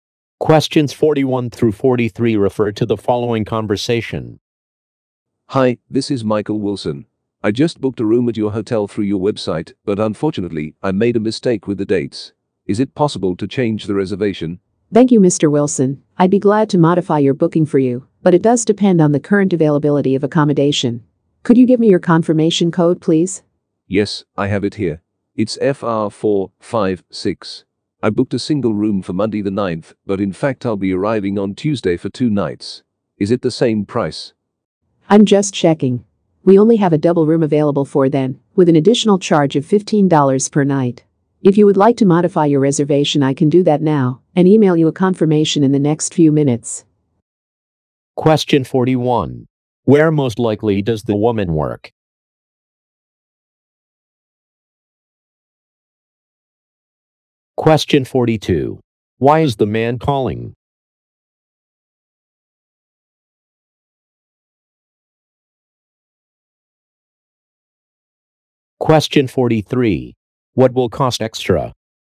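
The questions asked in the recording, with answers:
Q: Where most likely does the woman work?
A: At a hotel

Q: Why is the man calling?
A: To change the dates of his reservation

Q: What will cost extra?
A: A double room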